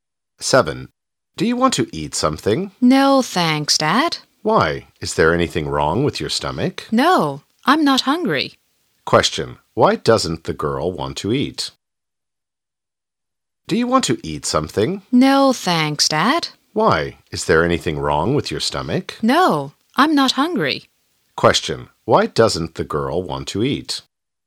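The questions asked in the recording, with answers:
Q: Why doesn't the girl want to eat?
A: She isn't hungry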